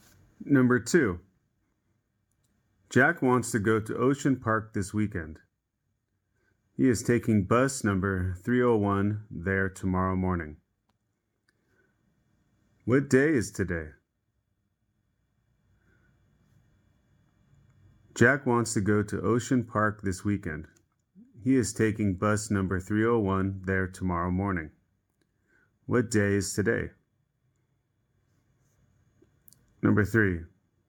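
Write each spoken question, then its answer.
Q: What day is today?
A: Friday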